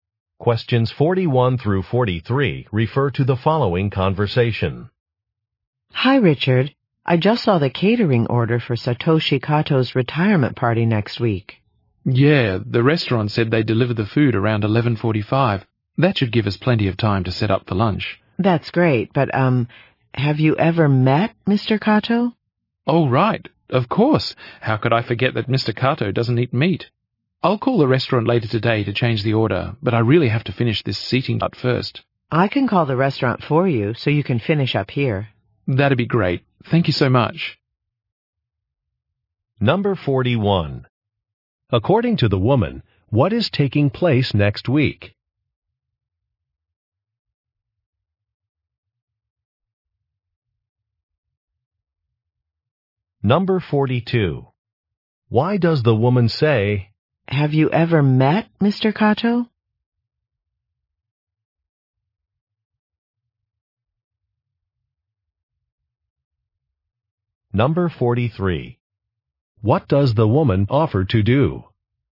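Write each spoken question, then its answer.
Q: According to the woman, what is taking place next week?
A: A retirement party

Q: Why does the woman say,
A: The food order needs changing because Mr. Kato doesn't eat meat

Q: What does the woman offer to do?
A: Call the restaurant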